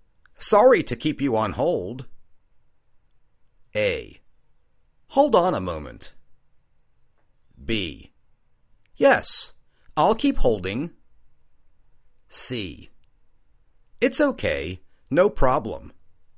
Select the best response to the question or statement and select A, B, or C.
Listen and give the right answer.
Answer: It's OK. No problem.